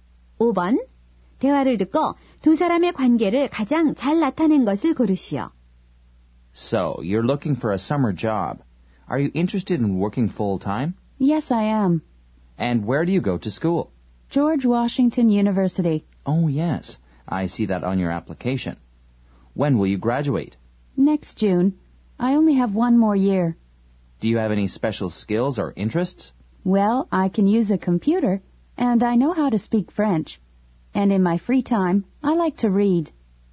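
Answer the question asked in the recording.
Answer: 면접관과 구직자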